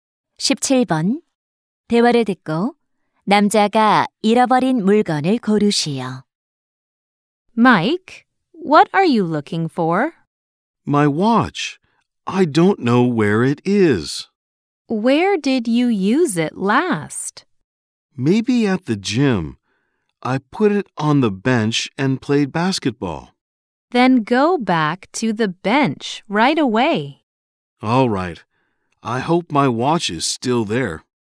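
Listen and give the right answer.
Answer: 손목시계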